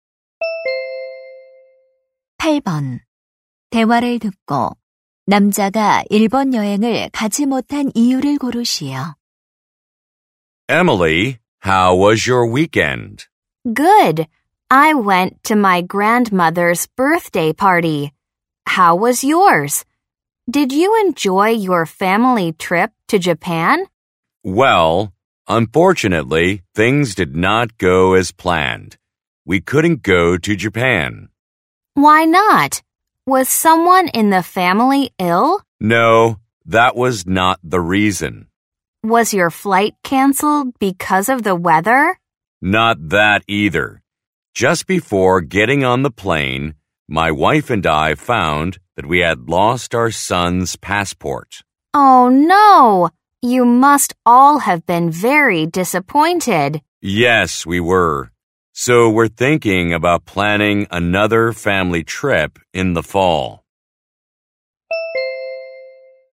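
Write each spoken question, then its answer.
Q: 대화를 듣고 남자가 일본 여행을 가지 못한 이유를 고르시오.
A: 아들의 여권을 잃어버려서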